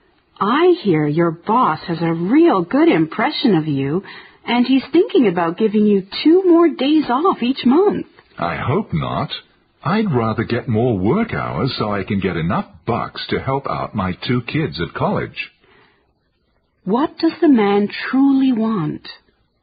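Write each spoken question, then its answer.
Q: What does the man truly want?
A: More work hours, to earn enough money to help his two kids at college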